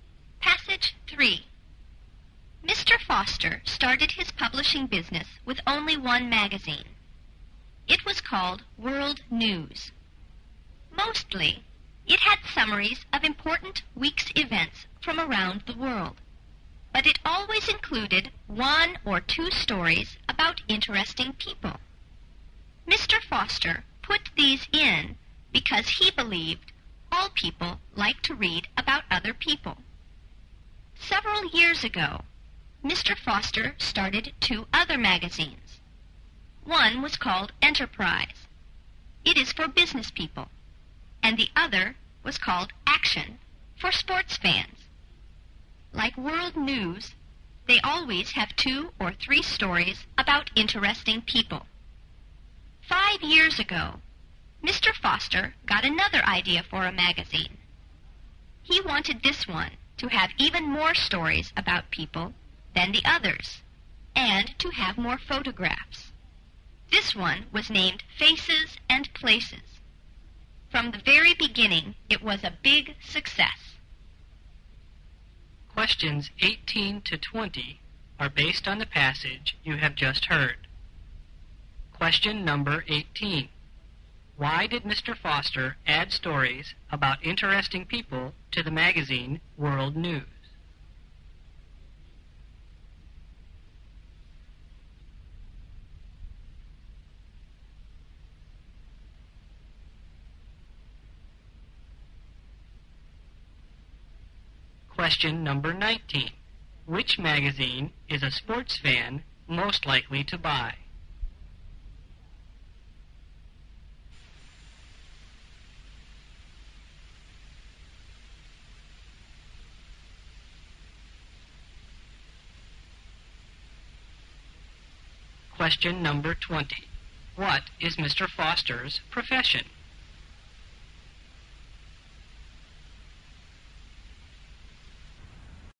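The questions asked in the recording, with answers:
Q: Which magazine is a sports fan most likely to buy?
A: Action

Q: What is Mr. Foster's profession?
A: Publisher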